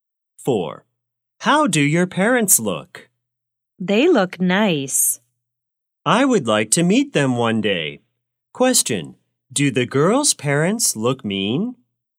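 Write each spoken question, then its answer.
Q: Question, do the girl's parents look mean?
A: No, they look nice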